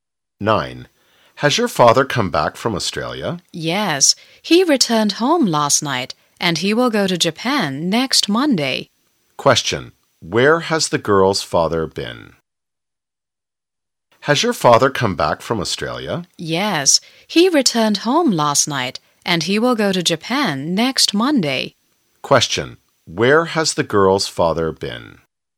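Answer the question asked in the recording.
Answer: Australia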